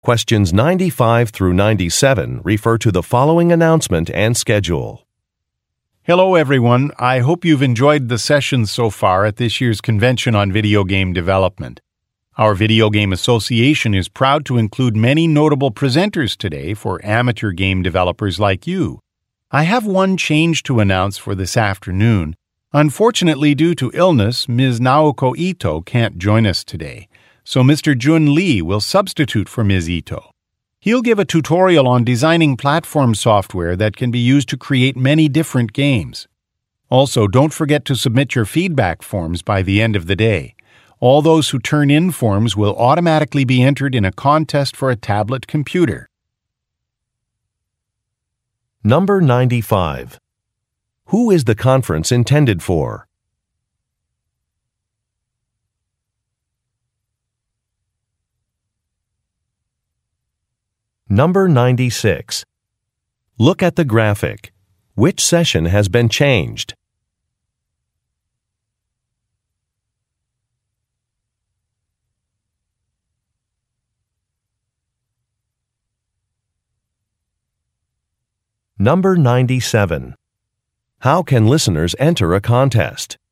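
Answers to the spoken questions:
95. Amateur game developers
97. By submitting a feedback form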